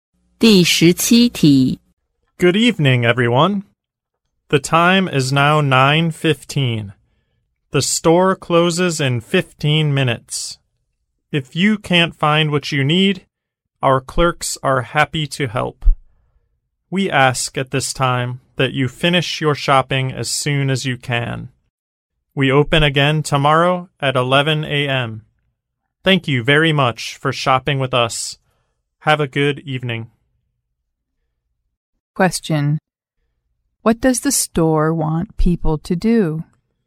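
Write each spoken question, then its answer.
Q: What does the store want people to do?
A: Finish their shopping soon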